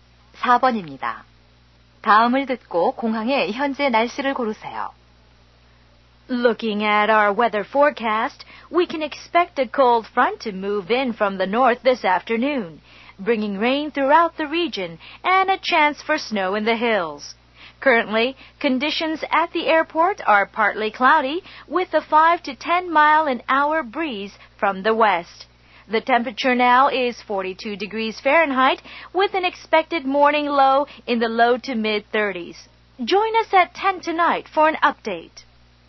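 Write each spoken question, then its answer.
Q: 다음을 듣고 공항의 현재 날씨를 고르세요.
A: 부분적으로 흐림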